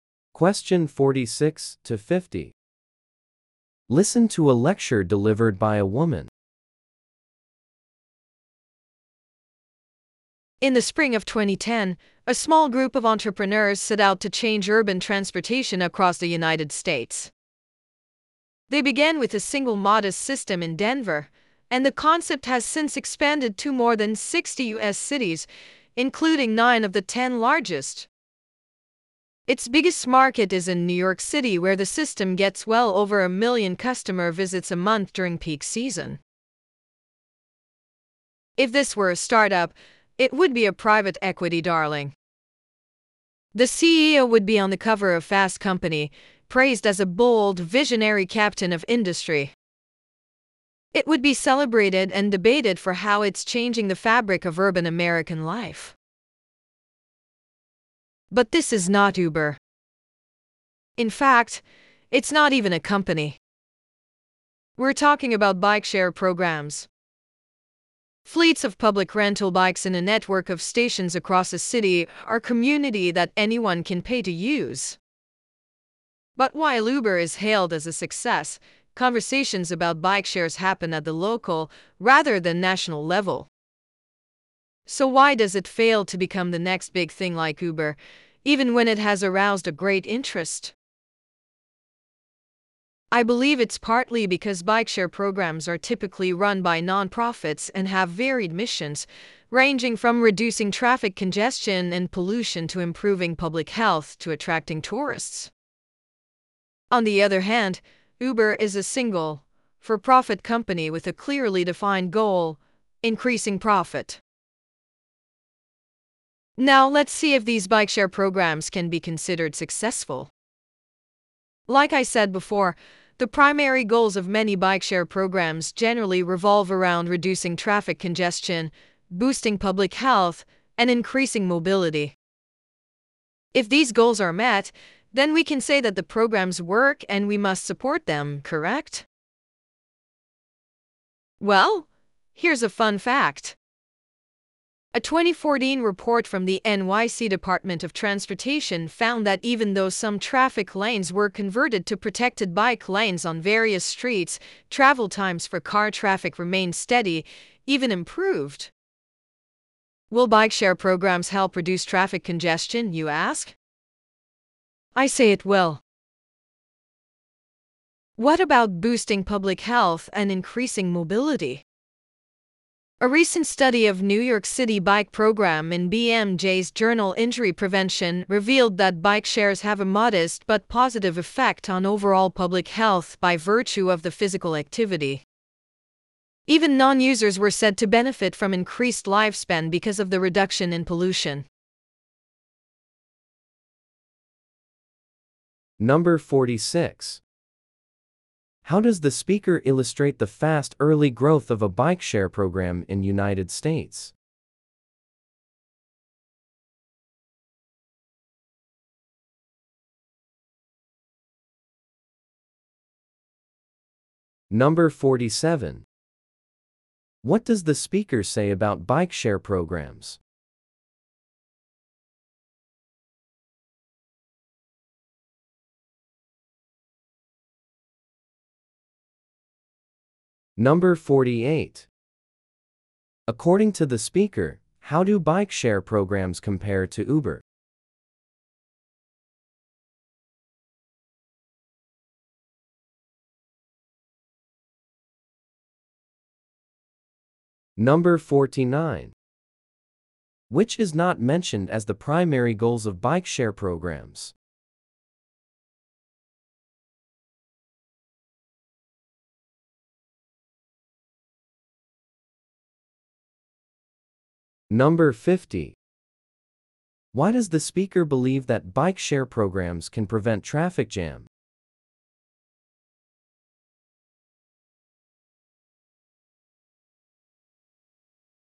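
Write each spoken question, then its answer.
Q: How does the speaker illustrate the fast early growth of a bike share program in United States?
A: It started with one system in Denver and grew to more than 60 cities

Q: According to the speaker, how do bike share programs compare to Uber?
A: Bike shares are run by nonprofits with varied missions, while Uber is one for-profit company

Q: Why does the speaker believe that bike share programs can prevent traffic jam?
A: A 2014 NYC report found car travel times stayed the same or improved after lanes were turned into bike lanes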